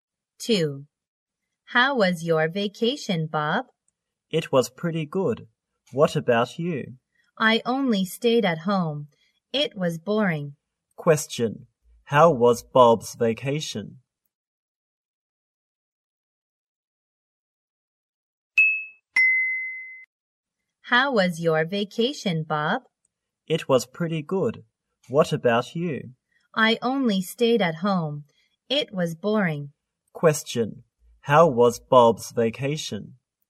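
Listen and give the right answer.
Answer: Pretty good.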